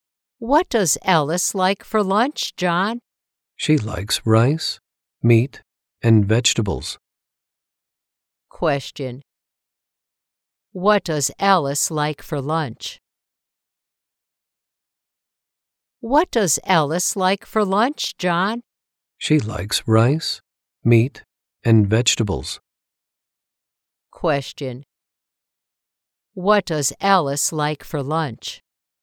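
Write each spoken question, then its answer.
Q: What does Alice like for lunch?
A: Rice, meat, and vegetables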